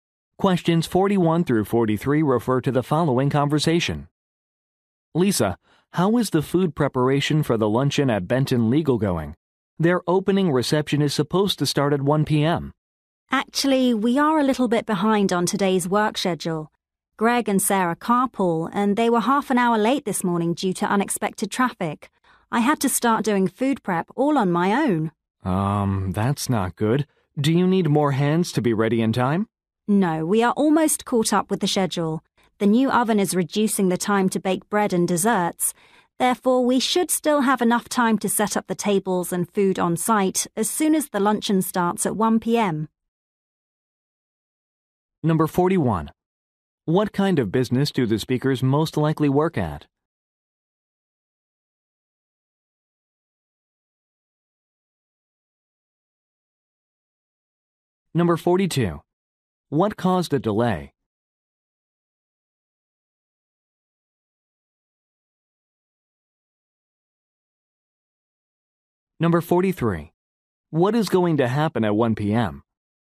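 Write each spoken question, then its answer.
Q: What kind of business do the speakers most likely work at?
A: A catering company

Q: What caused a delay?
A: Unexpected traffic made staff late

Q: What is going to happen at 1 p.m.?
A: The luncheon (opening reception) will start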